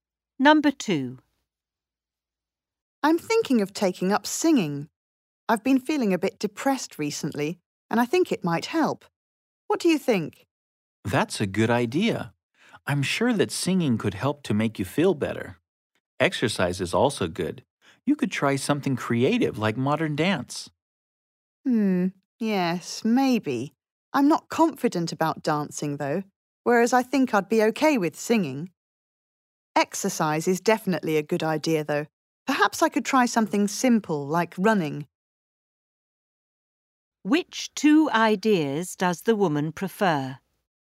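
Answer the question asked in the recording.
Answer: Singing and running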